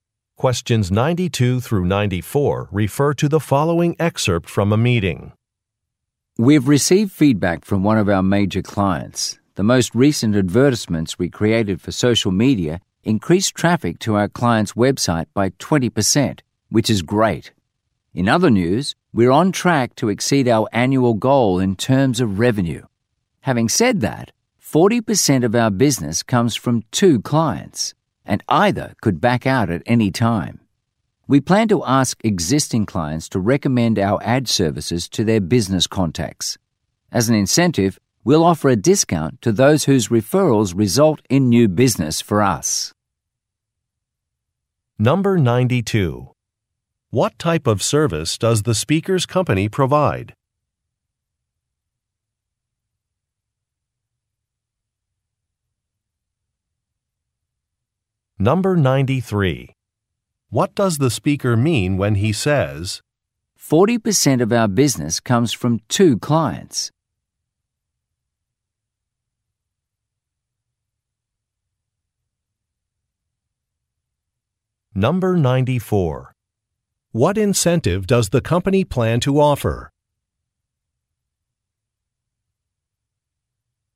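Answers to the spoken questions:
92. Advertising
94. A discount for referrals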